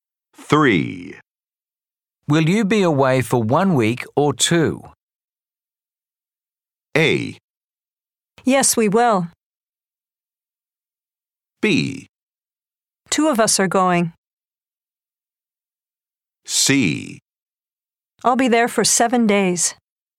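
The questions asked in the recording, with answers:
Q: Will you be away for 1 week or 2?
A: C: I'll be there for 7 days.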